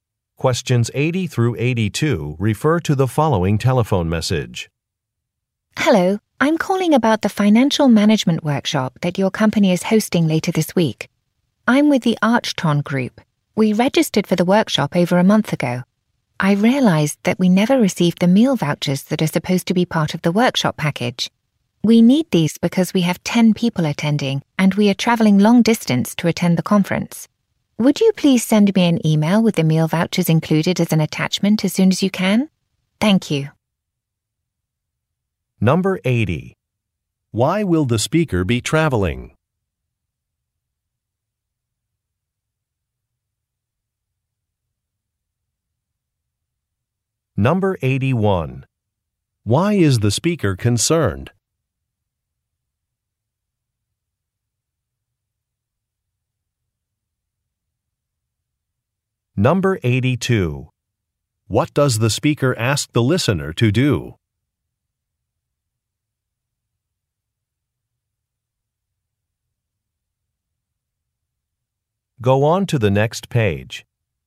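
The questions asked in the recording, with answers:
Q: Why will the speaker be traveling?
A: To attend a financial management workshop

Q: Why is the speaker concerned?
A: They never received the meal vouchers

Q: What does the speaker ask the listener to do?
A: Email the meal vouchers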